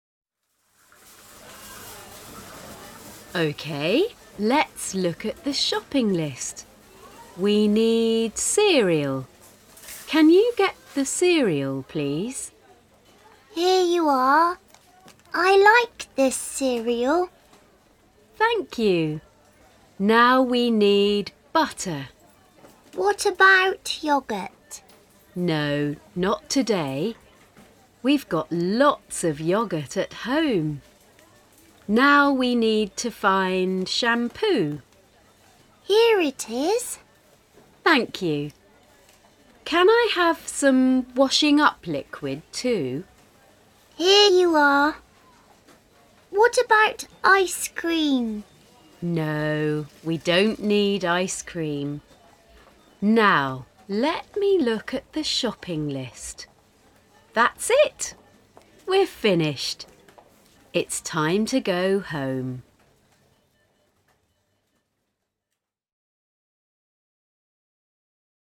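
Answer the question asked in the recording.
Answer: At the supermarket (shopping)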